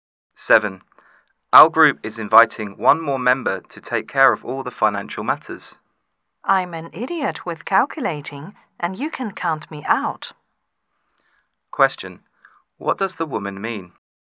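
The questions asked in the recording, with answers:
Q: What does the woman mean?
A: She doesn't want to take on the financial role.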